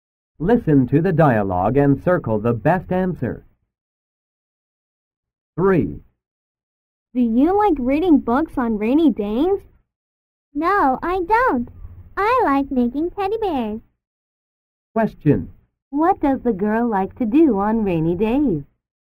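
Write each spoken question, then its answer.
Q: What does the girl like to do on rainy days?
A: Making teddy bears.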